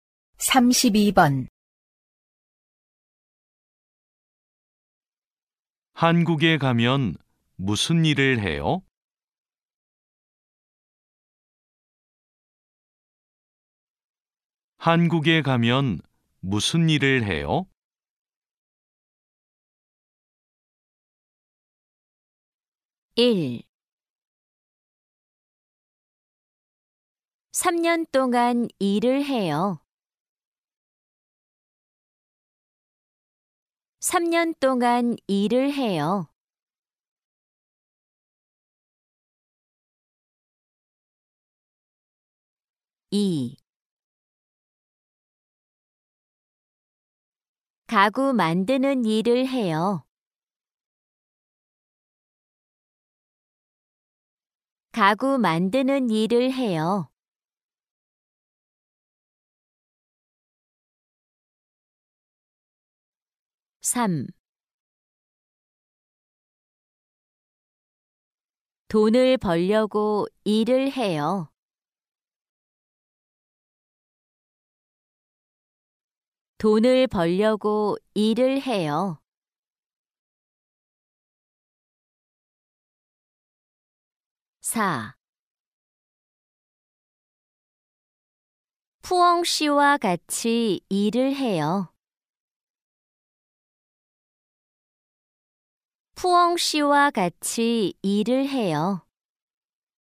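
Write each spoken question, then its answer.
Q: 한국에 가면 무슨 일을 해요?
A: 2: 가구 만드는 일을 해요.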